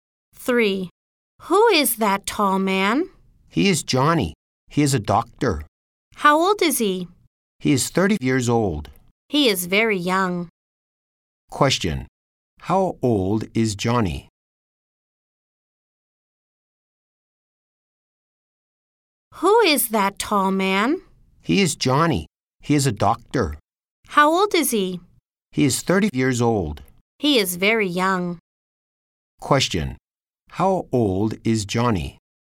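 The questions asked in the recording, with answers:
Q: How old is Johnny?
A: He is 30 years old.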